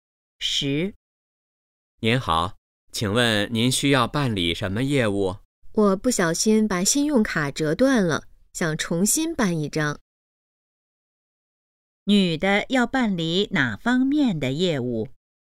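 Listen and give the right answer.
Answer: 重新办信用卡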